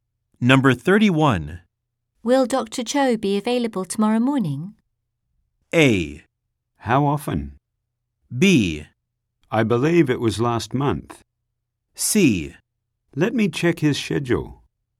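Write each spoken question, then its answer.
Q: Will Dr. Cho be available tomorrow morning?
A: C: Let me check his schedule.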